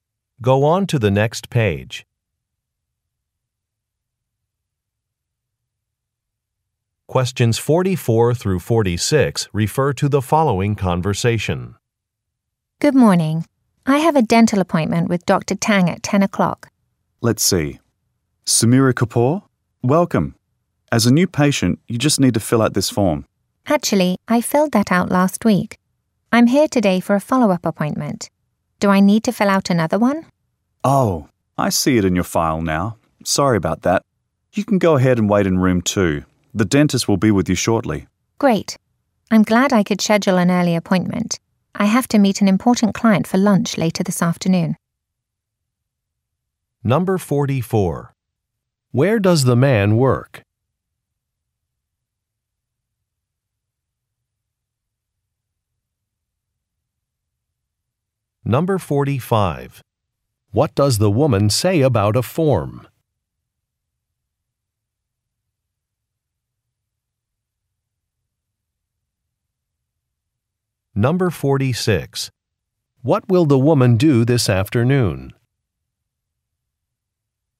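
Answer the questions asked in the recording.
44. At a dental office
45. She already filled it out last week
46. Meet an important client for lunch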